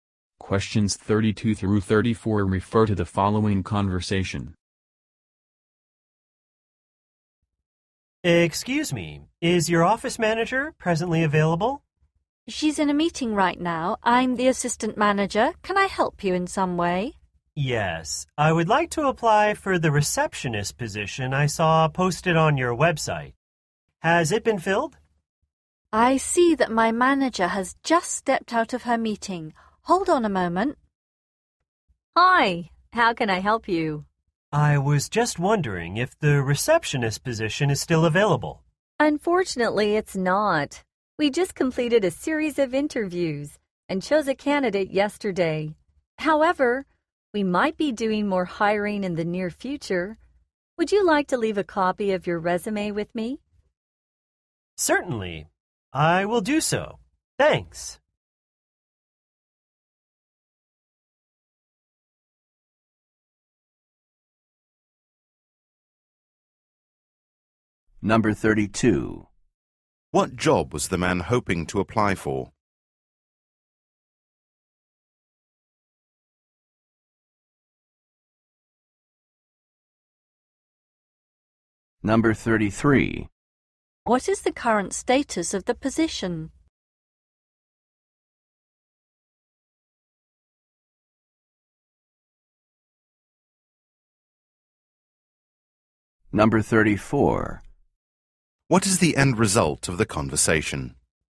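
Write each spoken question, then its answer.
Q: What job was the man hoping to apply for?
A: Receptionist

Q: What is the current status of the position?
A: It has already been filled

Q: What is the end result of the conversation?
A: He leaves a copy of his resume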